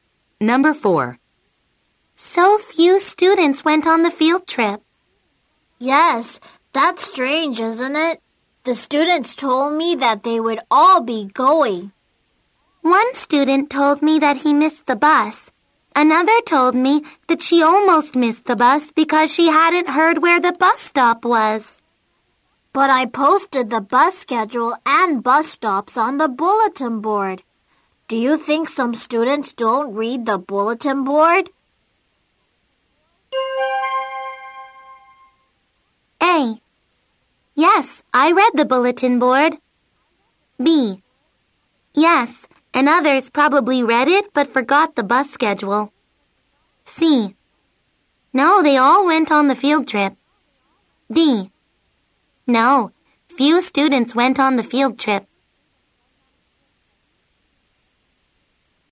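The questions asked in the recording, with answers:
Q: Do you think some students don't read the bulletin board?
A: B: Yes, and others probably read it but forgot the bus schedule.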